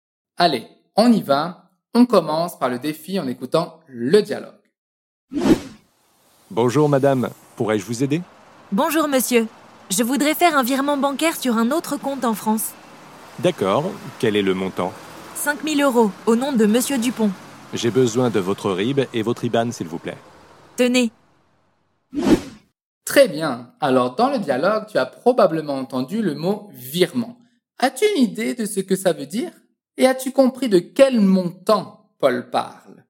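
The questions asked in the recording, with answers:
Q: Et as-tu compris de quel montant Paul parle ?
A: 5000 euros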